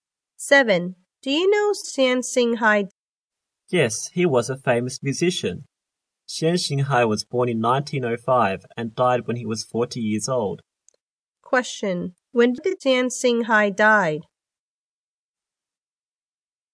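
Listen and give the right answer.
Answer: In 1945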